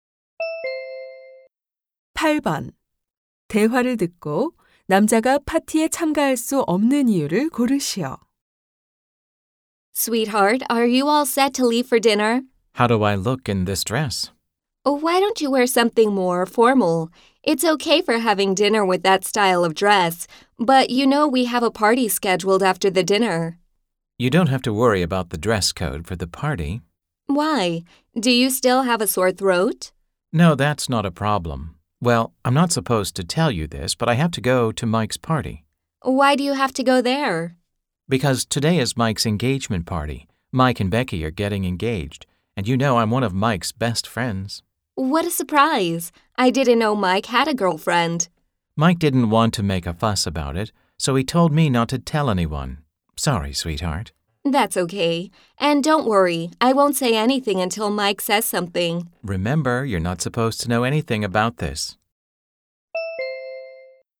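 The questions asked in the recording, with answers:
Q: 대화를 듣고 남자가 파티에 참가할 수 없는 이유를 고르시오.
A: 친구 Mike의 약혼 파티에 가야 해서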